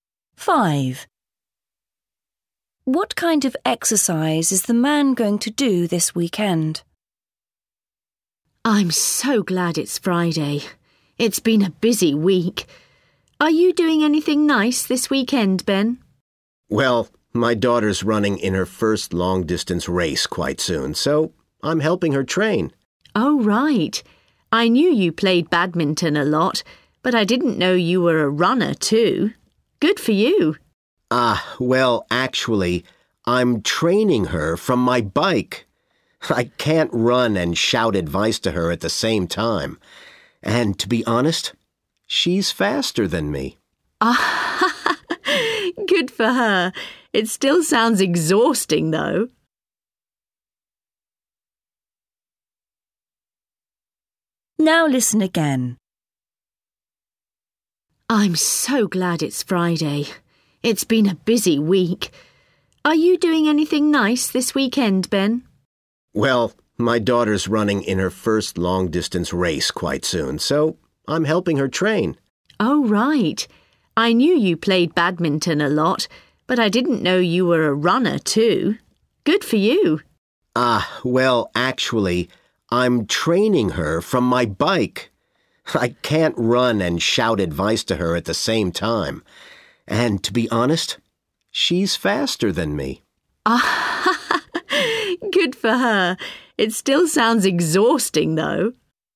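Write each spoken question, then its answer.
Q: What kind of exercise is the man going to do this weekend?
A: Cycling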